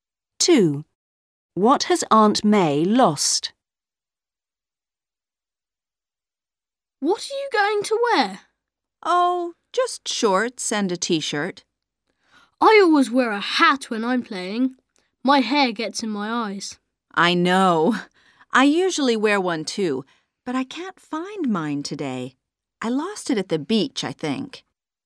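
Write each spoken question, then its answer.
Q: What has Aunt May lost?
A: Her hat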